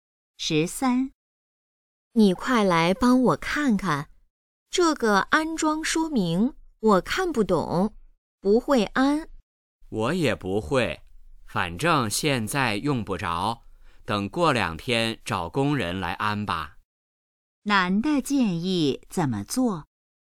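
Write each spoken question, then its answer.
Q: 男的建议怎么做?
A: 过两天找工人来安装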